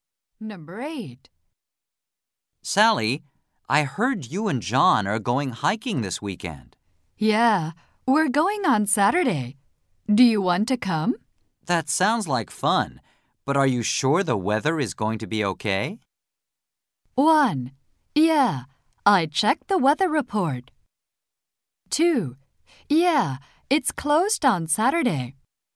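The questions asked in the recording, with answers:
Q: That sounds like fun, but are you sure the weather is going to be okay?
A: 1: Yeah, I checked the weather report.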